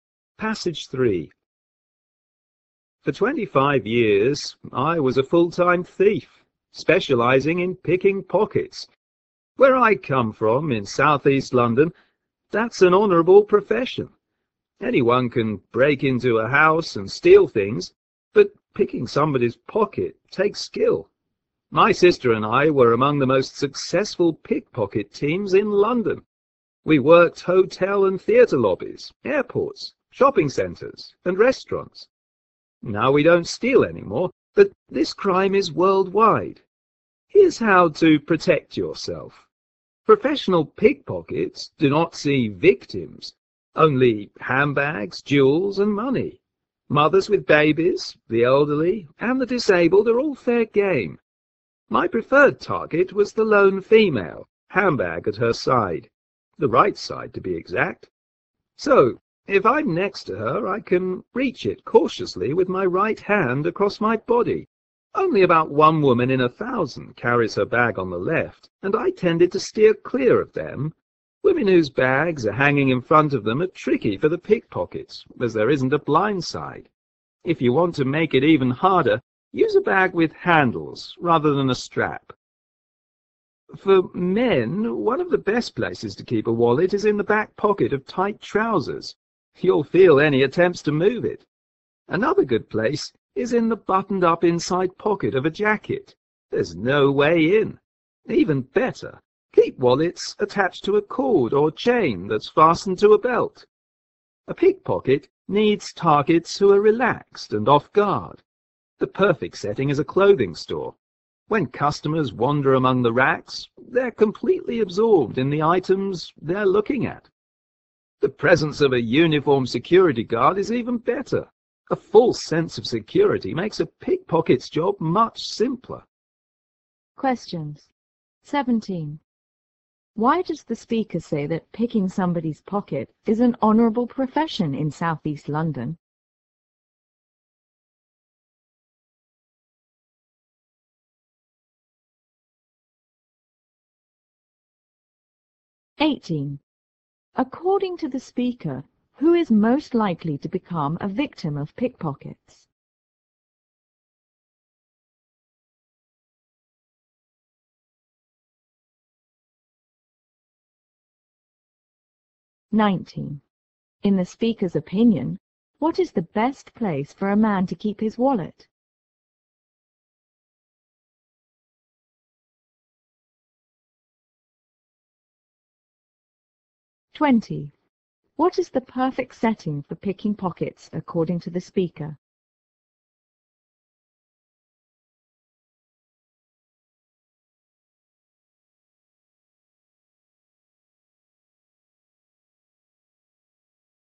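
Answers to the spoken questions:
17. Because it takes skill.
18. A woman alone with her handbag on her right side.
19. Attached to a cord or chain fastened to his belt.
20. A clothing store.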